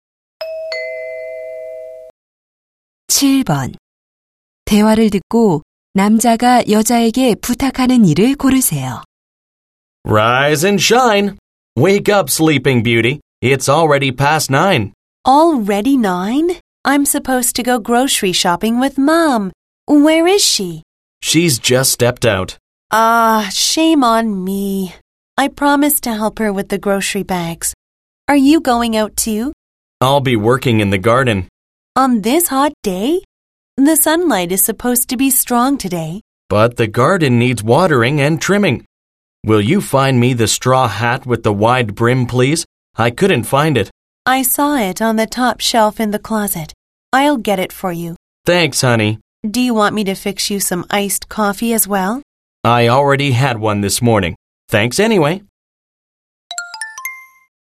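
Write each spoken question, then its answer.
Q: 대화를 듣고 남자가 여자에게 부탁하는 일을 고르세요.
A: 챙 넓은 밀짚모자 찾아 주기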